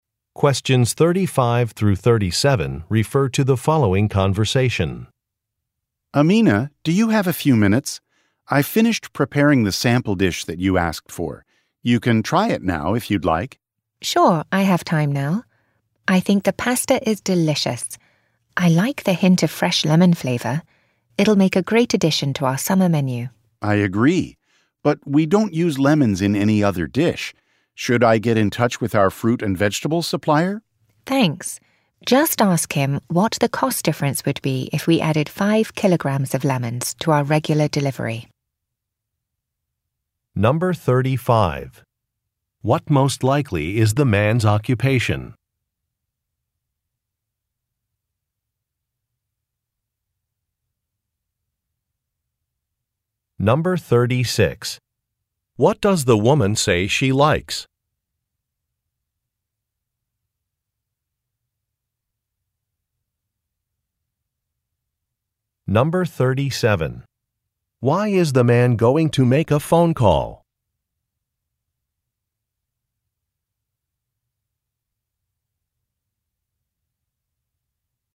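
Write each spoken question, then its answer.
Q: What does the woman say she likes?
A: The hint of fresh lemon flavor in the pasta

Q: Why is the man going to make a phone call?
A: To ask the supplier about the cost of adding lemons to the regular delivery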